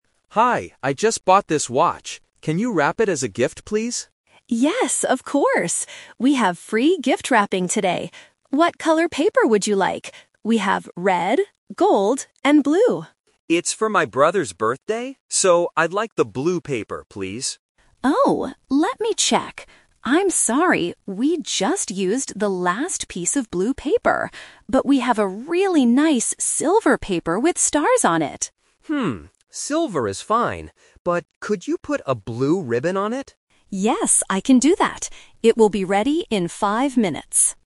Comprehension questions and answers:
Listen to the conversation and choose the correct answer (A, B, or C) for each question.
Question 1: What did the customer buy?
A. A watch.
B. A silver ring.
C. A blue ribbon.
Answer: A watch.

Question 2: Why can't the customer get the blue wrapping paper?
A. Because it costs extra money.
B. Because the store doesn't have any left.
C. Because it is only for children.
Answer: Because the store doesn't have any left.

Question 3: What will the final gift look like?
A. Blue paper with a silver ribbon.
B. Red paper with a gold ribbon.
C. Silver paper with a blue ribbon.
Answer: Silver paper with a blue ribbon.

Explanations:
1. In the first line, the customer says, "I just bought this watch." Why the trap is wrong: Option (C) is a trap because a "blue ribbon" is mentioned later, but it is for decoration, not the item he bought. Option (B) uses the word "silver", which is also mentioned, but he didn't buy a ring.
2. The staff apologizes and says, "we just used the last piece of blue paper." This means it is out of stock. Why the trap is wrong: Option (A) is a trap because the staff says "We have free gift wrapping today," so money is not the problem. Option (C) is not mentioned.
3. This is "The Twist". The customer wanted blue paper, but the store ran out. He agrees to use "silver" paper and asks for a "blue ribbon" on it. Why the trap is wrong: Option (A) is the trap because it mixes up the colors (the paper is silver, the ribbon is blue). Option (B) uses the colors the staff offered at the beginning (red and gold), but the customer didn't choose them.

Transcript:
Customer: Hi, I just bought this watch. Can you wrap it as a gift, please?
Staff: Yes, of course. We have free gift wrapping today. What color paper would you like? We have red, gold, and blue.
Customer: It's for my brother's birthday, so I'd like the blue paper, please.
Staff: Oh, let me check... I'm sorry, we just used the last piece of blue paper. But we have a really nice silver paper with stars on it.
Customer: Hmm, silver is fine. But could you put a blue ribbon on it?

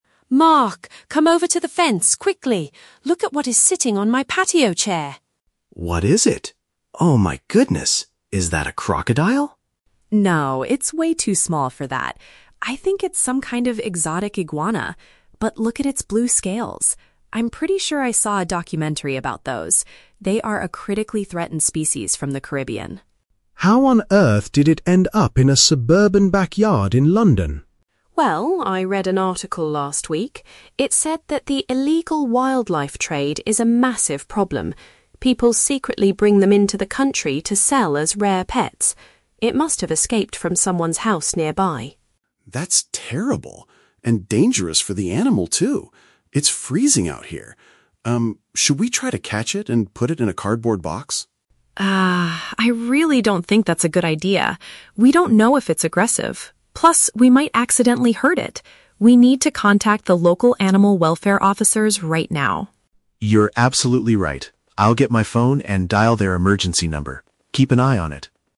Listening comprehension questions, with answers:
Listen to a conversation between two neighbors and choose the best answer (A, B, or C) for each question.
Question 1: What kind of animal did Susan find in her yard?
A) A young crocodile that escaped from a local zoo.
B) A rare type of lizard that is at risk of extinction.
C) A domestic pet snake with unusual blue markings.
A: A rare type of lizard that is at risk of extinction.

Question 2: How does Susan explain the animal's sudden appearance in their neighborhood?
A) She believes someone unlawfully imported it to keep in their home.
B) She thinks it traveled all the way from the Caribbean by itself.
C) She suspects a documentary filmmaker lost it during a recent video shoot.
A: She believes someone unlawfully imported it to keep in their home.

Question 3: What do the neighbors decide to do to resolve the situation?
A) Attempt to capture the animal safely using an empty box.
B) Get in touch with professionals who are trained to handle animals.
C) Provide some warm food because the creature is freezing outside.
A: Get in touch with professionals who are trained to handle animals.

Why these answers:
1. Susan identifies the animal as an "exotic iguana" (a type of lizard) and says they are a "critically threatened species". Option B paraphrases this as a "rare type of lizard that is at risk of extinction". Why the trap is wrong: Option (A) is a trap. Mark asks, "Is that a crocodile?" but Susan immediately rejects this idea, saying, "No, it's way too small for that." Option (C) is a plausible guess for a backyard animal, but a snake is never mentioned.
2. Susan mentions the "illegal wildlife trade" and says people "secretly bring them into the country to sell as rare pets." Option A uses synonyms: "unlawfully imported" (secretly bring/illegal trade) and "keep in their home" (pets). Why the trap is wrong: Option (C) is a trap. The word "documentary" is mentioned in the audio, but Susan says she saw a documentary about them, not that a filmmaker lost the animal. Option (B) is not mentioned.
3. Susan says, "We need to contact the local animal welfare officers right now," and Mark agrees to call their emergency number. Option B paraphrases this as getting in touch with "professionals who are trained to handle animals." Why the trap is wrong: Option (A) is a trap. Mark suggests they "try to catch it and put it in a cardboard box," but Susan explicitly rejects this ("I really don't think that's a good idea"). Option (C) is a trap; Mark mentions it is "freezing out here," but feeding the animal is never suggested.

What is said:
Susan: Mark, come over to the fence, quickly! Look at what is sitting on my patio chair.
Mark: What is it? Oh my goodness! Is that a crocodile?
Susan: No, it's way too small for that. I think it's some kind of exotic iguana. But look at its blue scales. I'm pretty sure I saw a documentary about those... they are a critically threatened species from the Caribbean.
Mark: How on earth did it end up in a suburban backyard in London?
Susan: Well, I read an article last week. It said that the illegal wildlife trade is a massive problem. People secretly bring them into the country to sell as rare pets. It must have escaped from someone's house nearby.
Mark: That's terrible. And dangerous for the animal, too. It's freezing out here. Um, should we try to catch it and put it in a cardboard box?
Susan: Ah, I really don't think that's a good idea. We don't know if it's aggressive. Plus, we might accidentally hurt it. We need to contact the local animal welfare officers right now.
Mark: You're absolutely right. I'll get my phone and dial their emergency number. Keep an eye on it!

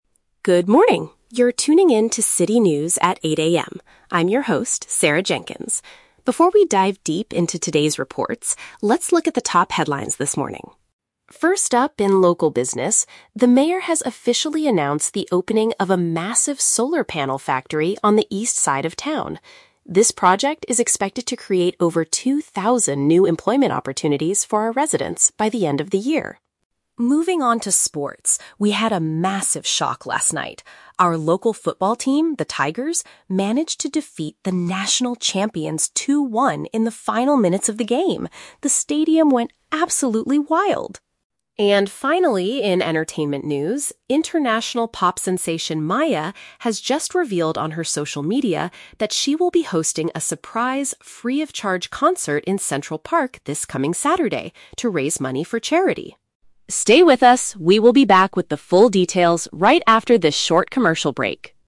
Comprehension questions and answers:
Listen to a news anchor reading the morning headlines. Choose the correct answer (A, B, or C) for each question.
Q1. According to the first news story, what is the main benefit of the new factory?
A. It will provide a large number of jobs for the community.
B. It will produce cheap electricity for the whole city.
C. The mayor will give two thousand dollars to local residents.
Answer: It will provide a large number of jobs for the community.

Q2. What happened in the football match yesterday evening?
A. The national champions won the game easily with a score of 2-1.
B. The local team lost the game at the very last minute.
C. The Tigers achieved an unexpected victory against a strong opponent.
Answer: The Tigers achieved an unexpected victory against a strong opponent.

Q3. What is special about the singer's upcoming performance?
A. It will be her final public appearance before she retires.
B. Audiences do not have to purchase tickets to attend it.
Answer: Audiences do not have to purchase tickets to attend it.

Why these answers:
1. The anchor states that the factory will "create over two thousand new employment opportunities for our residents". Option A paraphrases this perfectly (employment opportunities = jobs). Option B is the Trap: The audio mentions a "solar panel factory", so cheap electricity is a plausible real-world guess, but it is not mentioned in the news. Option C is a Trap: "Two thousand" is mentioned, but it refers to jobs, not money.
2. The anchor says it was a "massive shock" (unexpected) and the Tigers "managed to defeat the national champions" (victory against a strong opponent). Option C uses synonyms to express this. Option A is the Trap: The words "national champions" and "2-1" are used, but they were the ones who lost, not won. Option B is also a Trap: The "final minutes" are mentioned, but the Tigers won, they didn't lose.
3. The news mentions that it will be a "free-of-charge concert". Option B explains the meaning of "free-of-charge" (do not have to purchase tickets). Option A and Option C are Traps: Both are very common things pop stars do, but neither is mentioned in the broadcast. The purpose of the concert is to "raise money for charity".

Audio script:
I'm your host, Sarah Jenkins. Before we dive deep into today's reports, let's look at the top headlines this morning.
First up in local business, the mayor has officially announced the opening of a massive solar panel factory on the east side of town. This project is expected to create over two thousand new employment opportunities for our residents by the end of the year.
Moving on to sports, we had a massive shock last night. Our local football team, the Tigers, managed to defeat the national champions 2-1 in the final minutes of the game. The stadium went absolutely wild!
And finally, in entertainment news, international pop sensation Maya has just revealed on her social media that she will be hosting a surprise, free-of-charge concert in Central Park this coming Saturday to raise money for charity.
Stay with us, we will be back with the full details right after this short commercial break.

